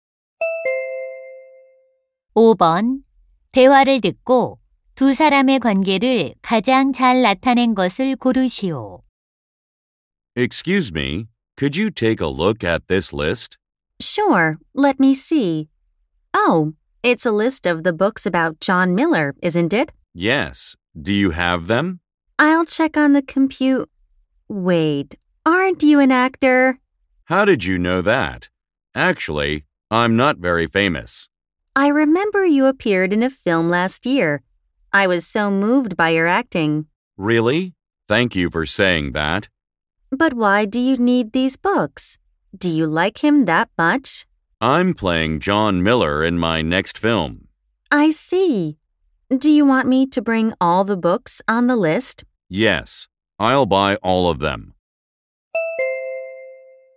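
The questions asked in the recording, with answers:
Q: 대화를 듣고 두 사람의 관계를 가장 잘 나타낸 것을 고르시오.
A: 서점 직원 - 배우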